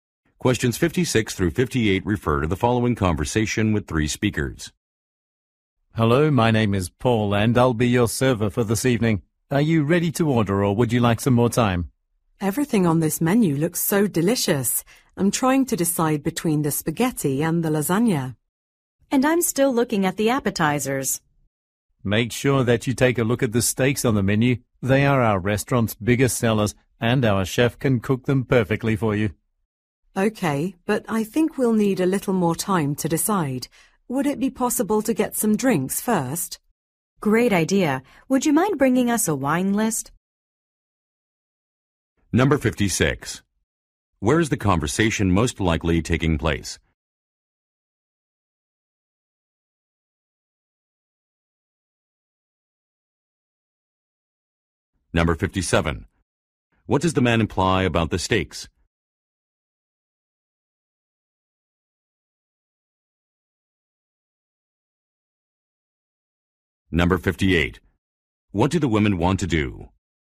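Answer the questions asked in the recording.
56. In a restaurant
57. They are popular and recommended
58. Order drinks first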